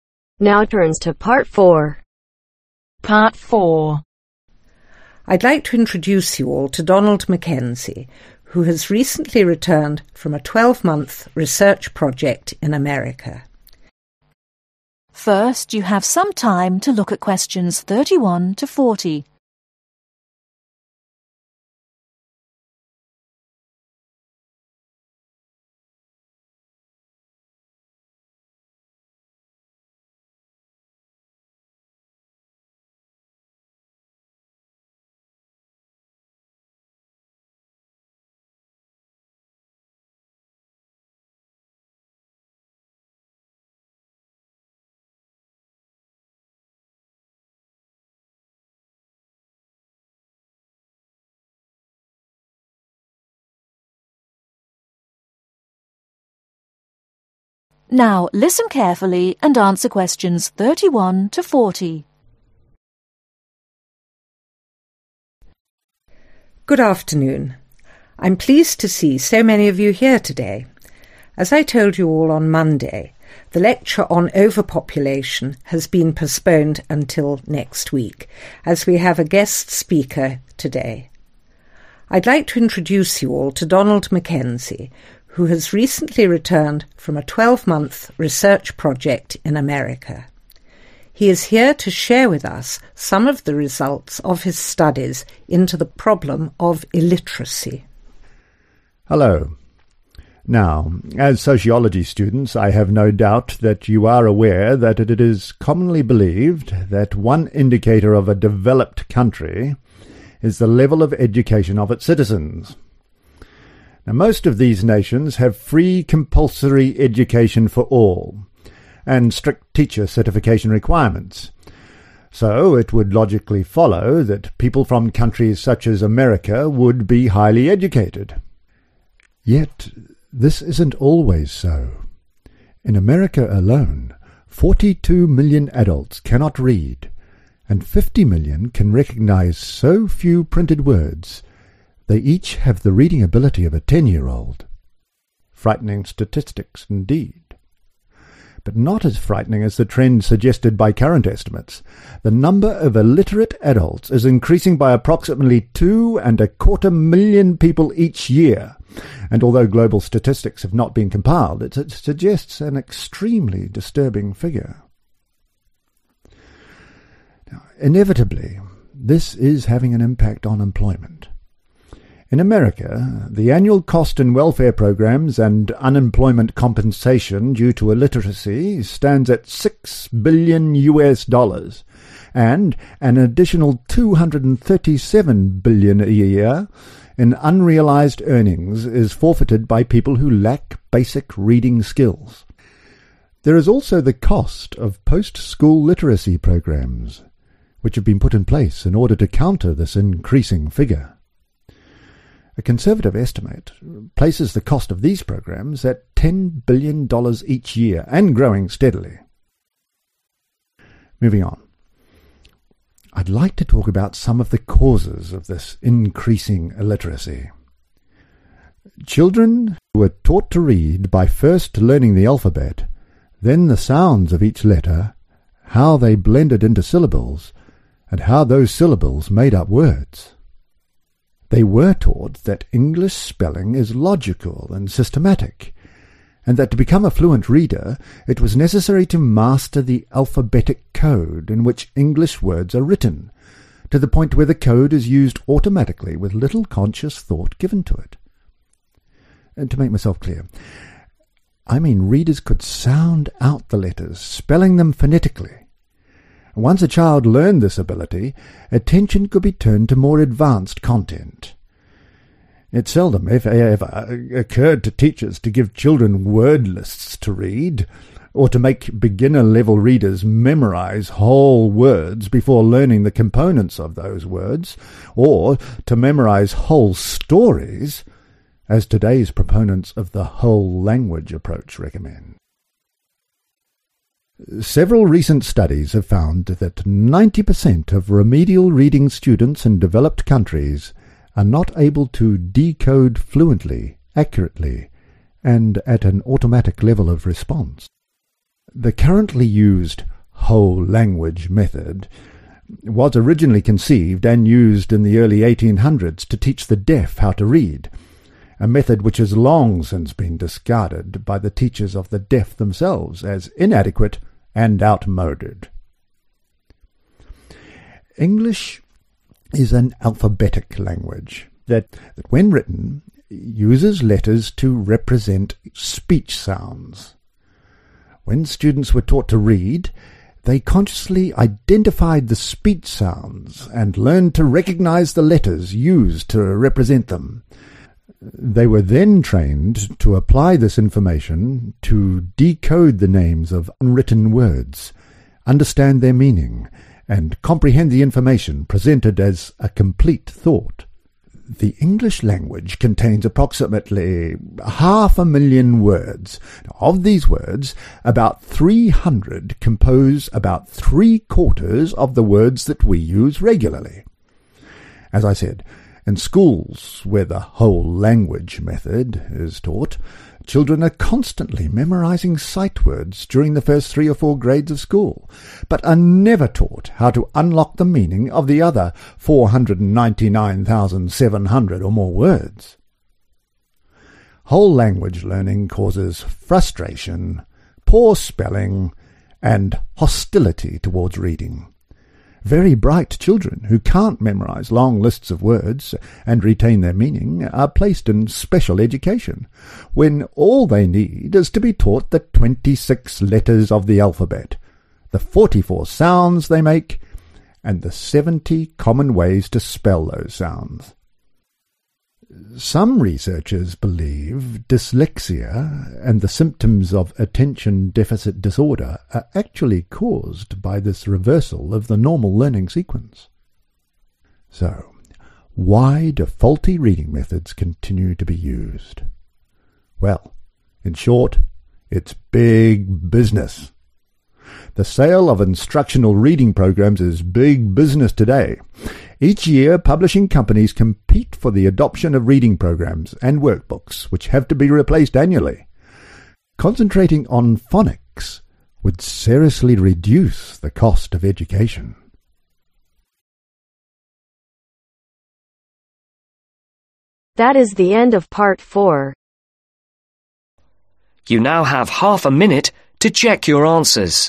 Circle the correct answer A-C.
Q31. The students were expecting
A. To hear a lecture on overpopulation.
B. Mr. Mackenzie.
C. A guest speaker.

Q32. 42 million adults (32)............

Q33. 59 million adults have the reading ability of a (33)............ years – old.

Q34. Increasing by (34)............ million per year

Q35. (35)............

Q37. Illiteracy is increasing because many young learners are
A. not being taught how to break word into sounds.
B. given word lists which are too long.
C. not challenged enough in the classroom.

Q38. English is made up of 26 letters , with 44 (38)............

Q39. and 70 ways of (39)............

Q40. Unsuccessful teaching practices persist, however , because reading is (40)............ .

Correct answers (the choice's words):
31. A guest speaker.
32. Cannot Read
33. 10
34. 2 1/4
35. 6
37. not being taught how to break word into sounds.
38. Sound
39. Spelling
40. Big Business